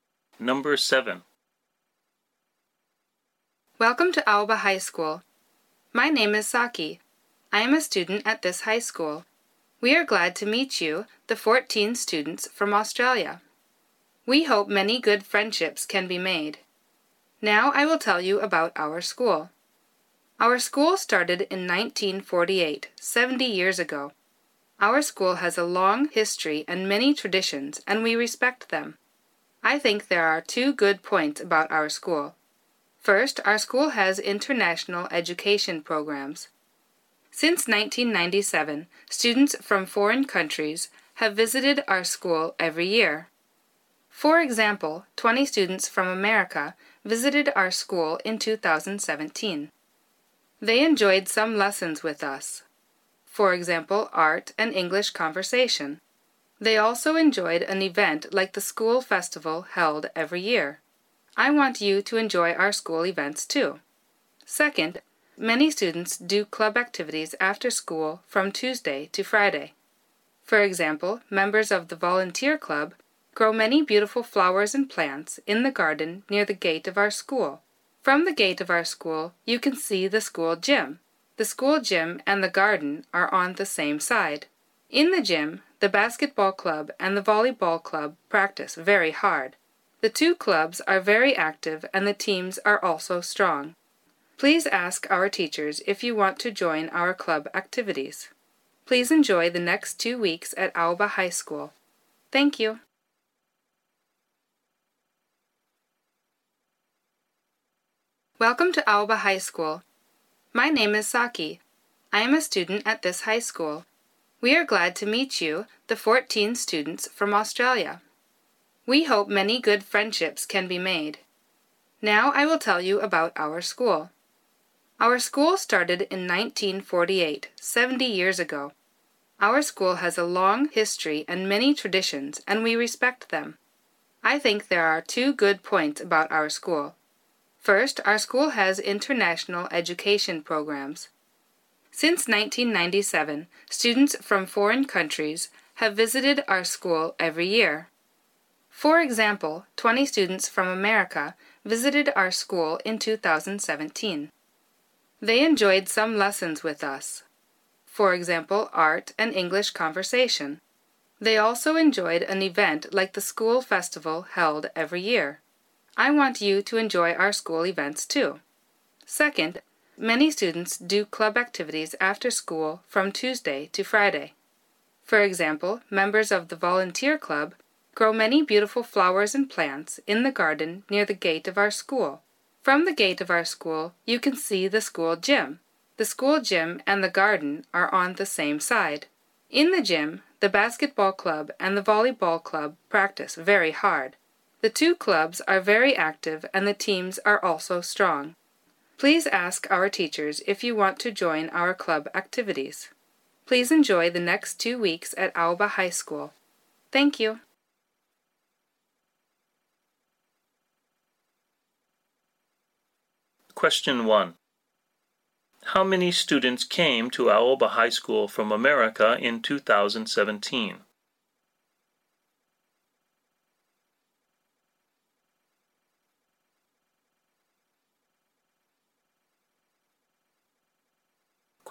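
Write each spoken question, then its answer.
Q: How many students came to Aoba High School from America in 2017?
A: 20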